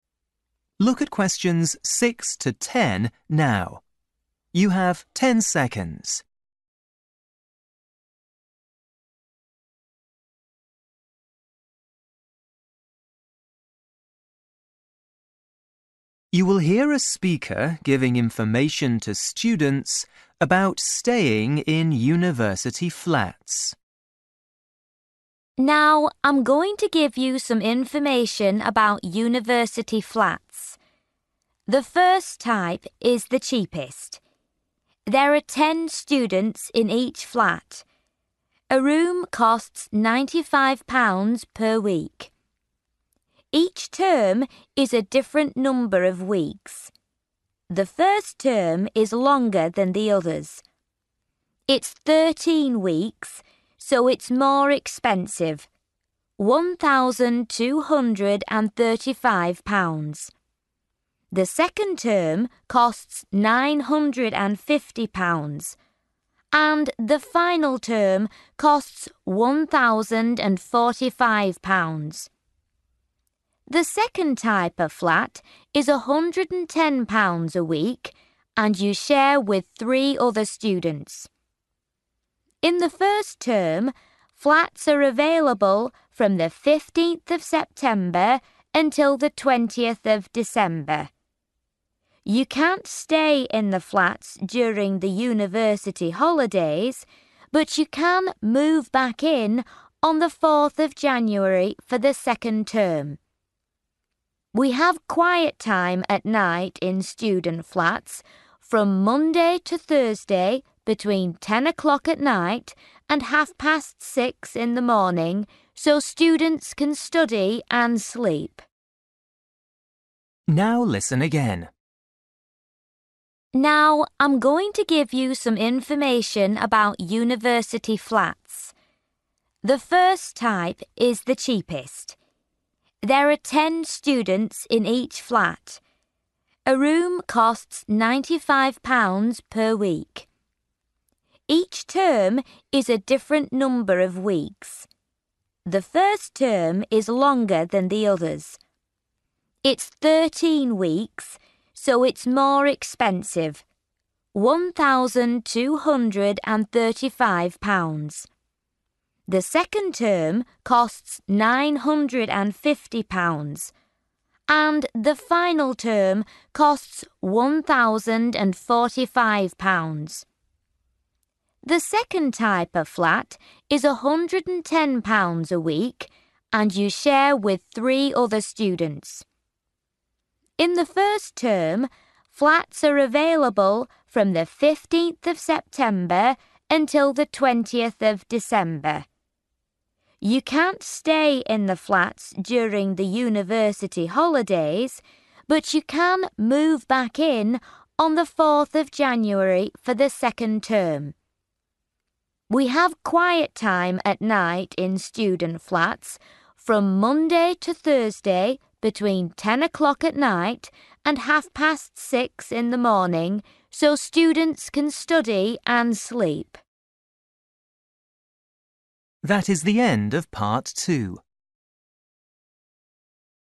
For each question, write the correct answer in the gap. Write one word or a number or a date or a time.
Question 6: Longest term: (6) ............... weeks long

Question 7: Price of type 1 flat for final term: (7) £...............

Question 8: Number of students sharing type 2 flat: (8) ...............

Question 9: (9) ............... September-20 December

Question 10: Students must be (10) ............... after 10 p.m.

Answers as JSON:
{"6": "13", "7": "1,045", "8": "4/four", "9": "15/fifteen", "10": "quiet"}

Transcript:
Woman: Now I'm going to give you some information about university flats. The first type is the cheapest. There are ten students in each flat. A room costs £95 per week. Each term is a different number of weeks. The first term is longer than the others. It's 13 weeks, so it's more expensive: one thousand two hundred and thirty-five pounds.
The second type of flat is £110 a week and you share with three other students. In the first term, flats are available from the fifteenth of September until the twentieth of December. You can't stay in the flats during the university holidays, but you can move back in on the fourth of January for the second term.
We have quiet time at night in student flats from Monday to Thursday between ten o'clock at night and half past six in the morning so students can study and sleep.

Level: KET (A2)